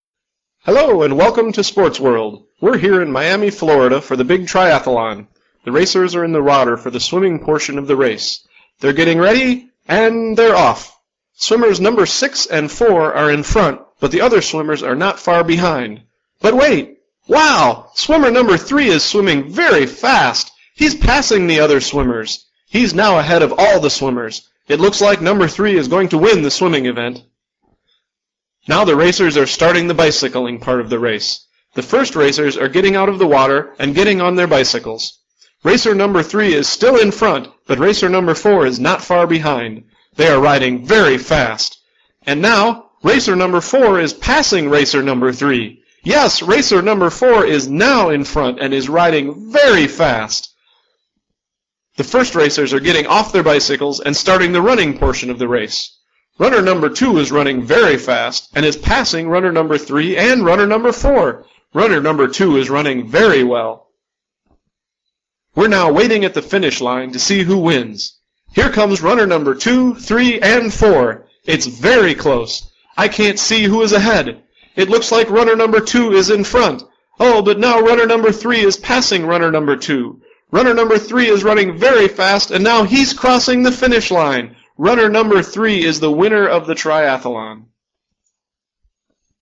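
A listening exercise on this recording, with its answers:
Who wins the triathlon?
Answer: Racer 3

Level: Beginning Level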